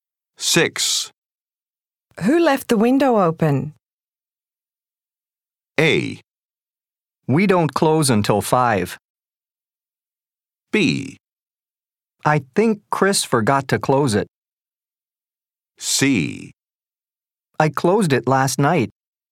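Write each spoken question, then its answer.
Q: Who left the window open?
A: B: I think Chris forgot to close it.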